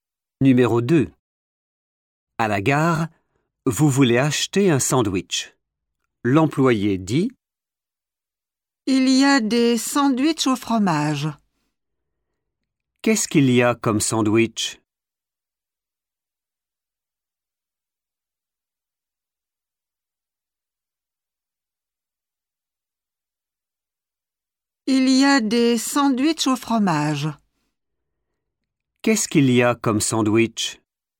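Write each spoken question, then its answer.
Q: Qu'est-ce qu'il y a comme sandwich?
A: des sandwichs au fromage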